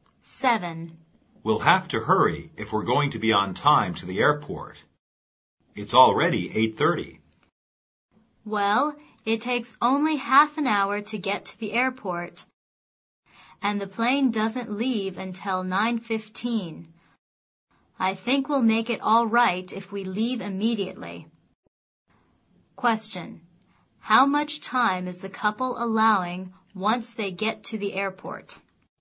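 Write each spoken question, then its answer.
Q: How much time is the couple allowing once they get to the airport?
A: 15 minutes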